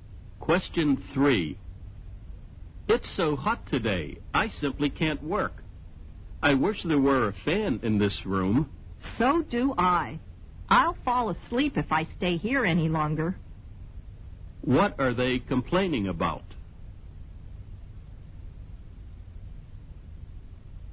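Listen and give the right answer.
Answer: The heat; it's too hot and there's no fan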